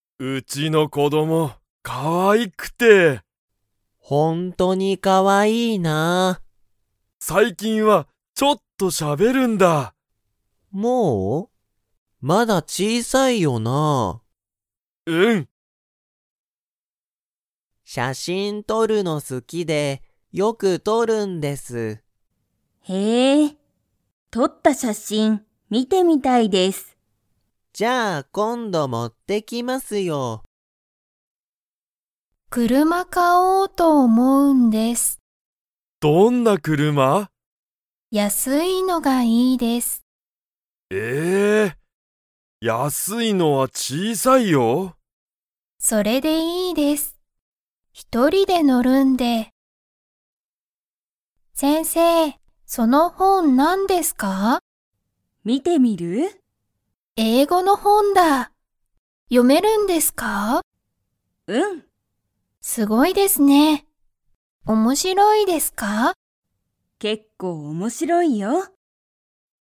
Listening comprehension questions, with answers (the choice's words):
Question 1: ケイタの子供(こども)は、最近(さいきん)____。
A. ほとんどしゃべらない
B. すごくしゃべりたい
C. よくしゃべる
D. ちょっとしゃべる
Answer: ちょっとしゃべる

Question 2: 柳(やなぎ)さんは写真(しゃしん)を____。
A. よく見(み)たい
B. 好(す)きじゃない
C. 今度持(こんども)ってくる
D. あまり撮(と)らない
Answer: 今度持(こんども)ってくる

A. はい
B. いいえ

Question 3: 山田(やまだ)さんは、大(おお)きい車(くるま)を買(か)いますか?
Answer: いいえ

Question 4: 先生(せんせい)は、英語(えいご)の本(ほん)を読(よ)めますか?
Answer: はい